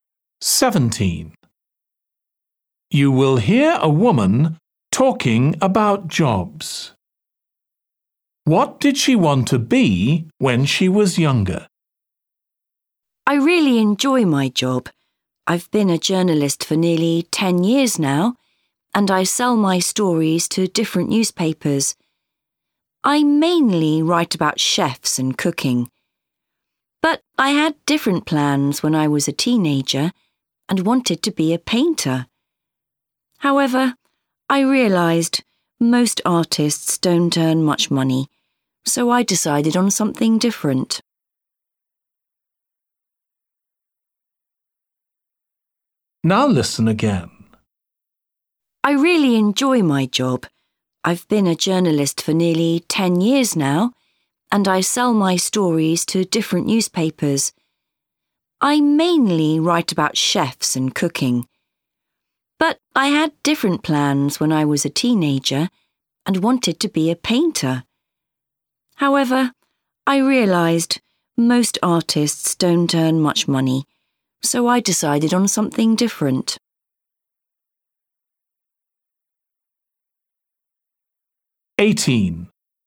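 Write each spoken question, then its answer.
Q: What did she want to be when she was younger?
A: A painter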